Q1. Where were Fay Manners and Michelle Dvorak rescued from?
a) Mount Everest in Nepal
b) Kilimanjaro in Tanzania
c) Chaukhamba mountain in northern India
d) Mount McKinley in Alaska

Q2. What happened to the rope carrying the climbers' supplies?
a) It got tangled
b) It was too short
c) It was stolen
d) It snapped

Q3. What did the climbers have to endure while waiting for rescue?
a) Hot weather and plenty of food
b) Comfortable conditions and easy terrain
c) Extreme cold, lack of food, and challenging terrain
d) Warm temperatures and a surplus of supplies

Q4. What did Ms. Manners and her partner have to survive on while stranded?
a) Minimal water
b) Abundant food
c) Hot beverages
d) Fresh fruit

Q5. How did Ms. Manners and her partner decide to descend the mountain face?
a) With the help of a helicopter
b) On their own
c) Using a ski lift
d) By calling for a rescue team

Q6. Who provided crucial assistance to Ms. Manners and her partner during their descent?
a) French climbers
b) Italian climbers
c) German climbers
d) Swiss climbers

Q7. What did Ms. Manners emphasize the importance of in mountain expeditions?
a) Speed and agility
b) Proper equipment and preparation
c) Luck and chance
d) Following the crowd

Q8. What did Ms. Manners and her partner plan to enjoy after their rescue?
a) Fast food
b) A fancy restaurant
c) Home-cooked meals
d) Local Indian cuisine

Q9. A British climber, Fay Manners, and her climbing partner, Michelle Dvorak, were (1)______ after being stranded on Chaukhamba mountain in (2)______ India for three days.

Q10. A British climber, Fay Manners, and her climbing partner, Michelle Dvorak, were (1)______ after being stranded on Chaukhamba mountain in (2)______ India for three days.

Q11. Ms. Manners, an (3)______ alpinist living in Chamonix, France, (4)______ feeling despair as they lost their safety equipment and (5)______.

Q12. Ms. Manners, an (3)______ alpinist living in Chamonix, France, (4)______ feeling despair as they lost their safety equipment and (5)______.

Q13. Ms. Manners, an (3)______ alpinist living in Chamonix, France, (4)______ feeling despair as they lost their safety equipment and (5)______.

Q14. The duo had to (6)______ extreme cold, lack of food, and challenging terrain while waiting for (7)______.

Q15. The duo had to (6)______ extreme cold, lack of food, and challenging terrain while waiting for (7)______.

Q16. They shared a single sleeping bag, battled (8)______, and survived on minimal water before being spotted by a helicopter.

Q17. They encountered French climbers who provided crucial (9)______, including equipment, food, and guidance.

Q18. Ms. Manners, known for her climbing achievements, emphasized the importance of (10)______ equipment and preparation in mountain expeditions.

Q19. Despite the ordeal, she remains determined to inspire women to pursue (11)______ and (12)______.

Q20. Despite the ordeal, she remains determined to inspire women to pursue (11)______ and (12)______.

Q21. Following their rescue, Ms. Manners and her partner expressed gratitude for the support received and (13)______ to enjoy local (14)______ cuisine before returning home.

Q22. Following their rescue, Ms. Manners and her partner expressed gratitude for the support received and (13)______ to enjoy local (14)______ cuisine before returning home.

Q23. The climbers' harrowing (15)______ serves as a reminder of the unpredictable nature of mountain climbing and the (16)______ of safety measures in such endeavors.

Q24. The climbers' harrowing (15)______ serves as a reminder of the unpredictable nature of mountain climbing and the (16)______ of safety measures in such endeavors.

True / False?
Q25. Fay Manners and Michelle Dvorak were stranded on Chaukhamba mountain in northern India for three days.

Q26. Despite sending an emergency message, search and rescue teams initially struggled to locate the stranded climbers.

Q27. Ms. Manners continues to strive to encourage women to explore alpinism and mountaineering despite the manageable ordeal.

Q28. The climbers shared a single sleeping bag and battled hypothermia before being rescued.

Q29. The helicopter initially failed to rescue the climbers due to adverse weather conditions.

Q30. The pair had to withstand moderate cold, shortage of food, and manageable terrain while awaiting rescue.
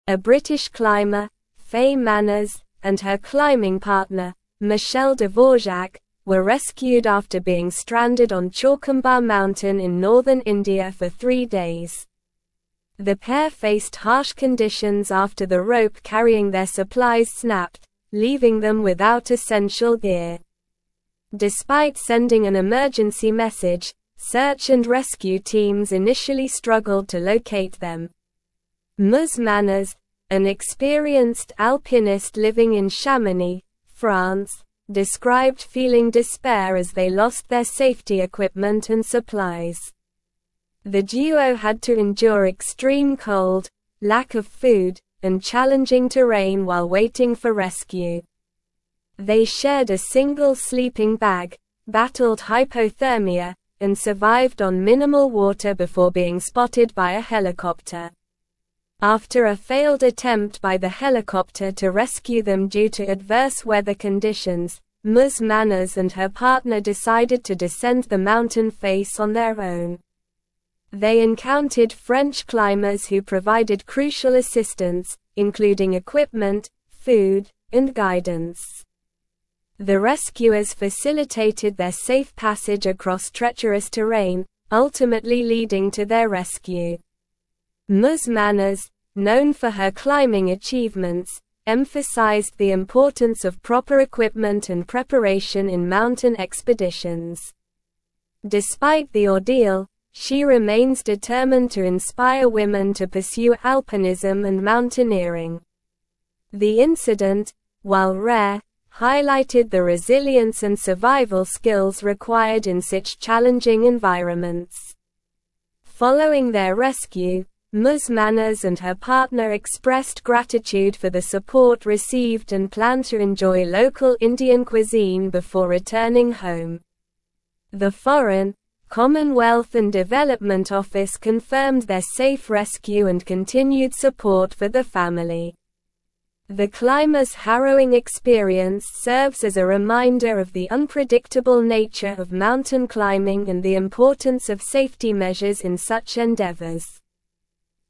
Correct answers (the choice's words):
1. Chaukhamba mountain in northern India
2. It snapped
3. Extreme cold, lack of food, and challenging terrain
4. Minimal water
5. On their own
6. French climbers
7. Proper equipment and preparation
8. Local Indian cuisine
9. rescued
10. northern
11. experienced
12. described
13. supplies
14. endure
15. rescue
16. hypothermia
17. assistance
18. proper
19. alpinism
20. mountaineering
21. planned
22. Indian
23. experience
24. importance
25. True
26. True
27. False
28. True
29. True
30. False

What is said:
A British climber, Fay Manners, and her climbing partner, Michelle Dvorak, were rescued after being stranded on Chaukhamba mountain in northern India for three days. The pair faced harsh conditions after the rope carrying their supplies snapped, leaving them without essential gear. Despite sending an emergency message, search and rescue teams initially struggled to locate them.
Ms. Manners, an experienced alpinist living in Chamonix, France, described feeling despair as they lost their safety equipment and supplies. The duo had to endure extreme cold, lack of food, and challenging terrain while waiting for rescue. They shared a single sleeping bag, battled hypothermia, and survived on minimal water before being spotted by a helicopter.
After a failed attempt by the helicopter to rescue them due to adverse weather conditions, Ms. Manners and her partner decided to descend the mountain face on their own. They encountered French climbers who provided crucial assistance, including equipment, food, and guidance. The rescuers facilitated their safe passage across treacherous terrain, ultimately leading to their rescue.
Ms. Manners, known for her climbing achievements, emphasized the importance of proper equipment and preparation in mountain expeditions. Despite the ordeal, she remains determined to inspire women to pursue alpinism and mountaineering. The incident, while rare, highlighted the resilience and survival skills required in such challenging environments.
Manners and her partner expressed gratitude for the support received and planned to enjoy local Indian cuisine before returning home. The Foreign, Commonwealth & Development Office confirmed their safe rescue and continued support for the family. The climbers' harrowing experience serves as a reminder of the unpredictable nature of mountain climbing and the importance of safety measures in such endeavors.

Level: Level 4